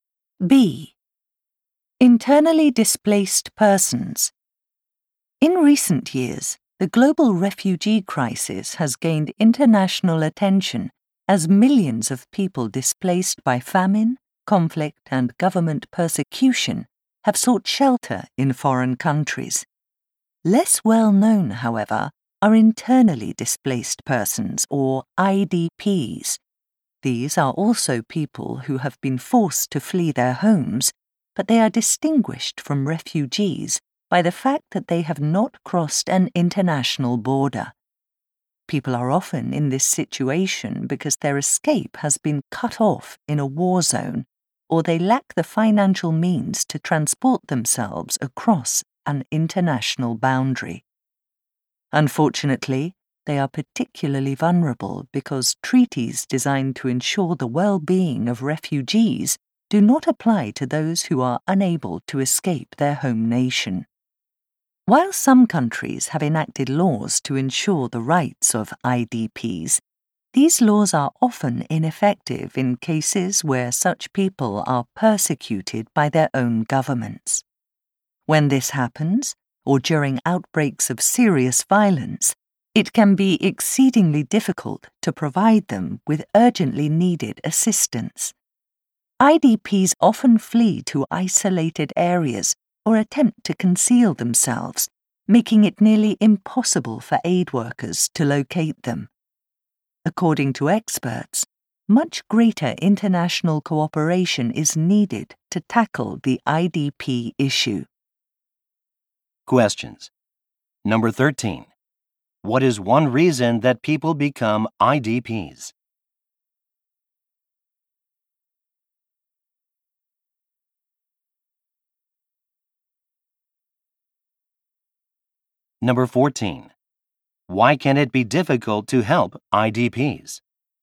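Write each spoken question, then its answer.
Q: Why can it be difficult to help IDPs?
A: They often flee to isolated areas or hide, so aid workers cannot find them.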